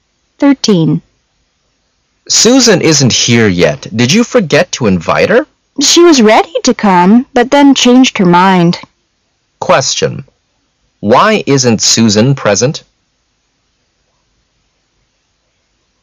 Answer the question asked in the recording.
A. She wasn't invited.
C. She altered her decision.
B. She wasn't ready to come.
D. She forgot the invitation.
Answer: C. She altered her decision.

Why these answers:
信息明示题。女士说苏珊原木要来,但又改变主意了,所以C(她改变了决定)正确。 [考点] change one's mind意为"改变决定或意见",如:Nothing will make me change my mind. 任何事都不能使我改变主意。